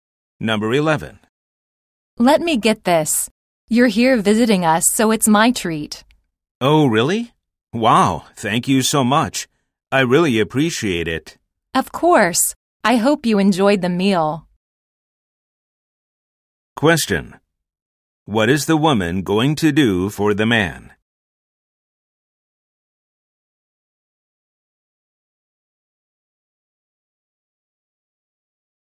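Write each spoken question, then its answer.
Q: What is the woman going to do for the man?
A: Pay for his meal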